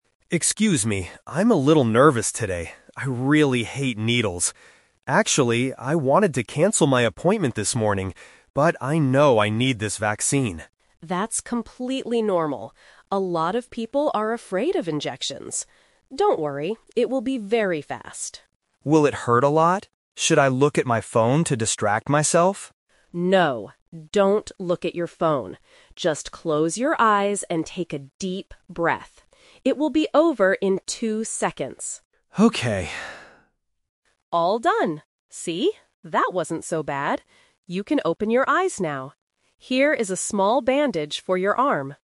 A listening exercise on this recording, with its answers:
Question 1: What did the patient think about doing this morning?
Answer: Canceling his appointment.

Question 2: What does the nurse tell the patient to do during the injection?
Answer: Close his eyes and breathe.

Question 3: What does the nurse give the patient at the end?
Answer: A small bandage.

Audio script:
Patient: Excuse me, I'm a little nervous today. I really hate needles. Actually, I wanted to cancel my appointment this morning, but I know I need this vaccine.
Nurse: That's completely normal. A lot of people are afraid of injections. Don't worry, it will be very fast.
Patient: Will it hurt a lot? Should I look at my phone to distract myself?
Nurse: No, don't look at your phone. Just close your eyes and take a deep breath. It will be over in two seconds.
Patient: Okay...
Nurse: All done! See? That wasn't so bad. You can open your eyes now. Here is a small bandage for your arm.